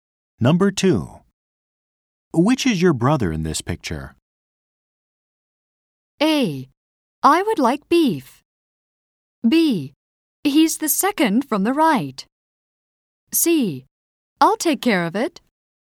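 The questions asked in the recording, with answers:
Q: Which is your brother in this picture?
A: B: He's the second from the right.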